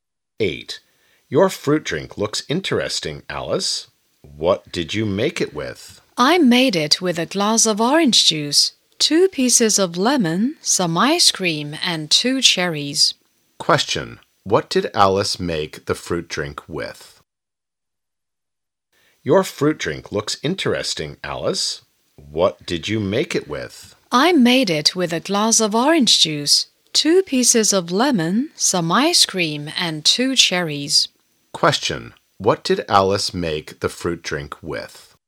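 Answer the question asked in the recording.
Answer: A glass of orange juice, 2 pieces of lemon, some ice cream and 2 cherries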